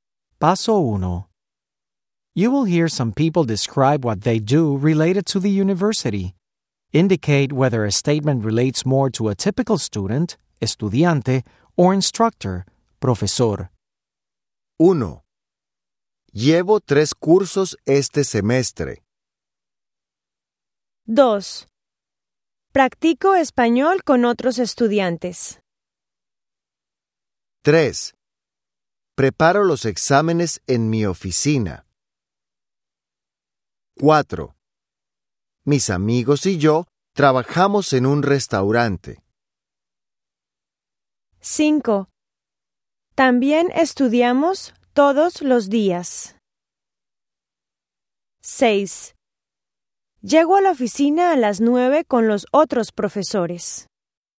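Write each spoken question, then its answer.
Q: Llevo 3 cursos este semestre.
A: estudiante

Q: Practico español con otros estudiantes.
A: estudiante

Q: Preparo los exámenes en mi oficina.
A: profesor

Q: Mis amigos y yo trabajamos en un restaurante.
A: estudiante

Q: También estudiamos todos los días.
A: estudiante

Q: Llego a la oficina a las 9 con los otros profesores.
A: profesor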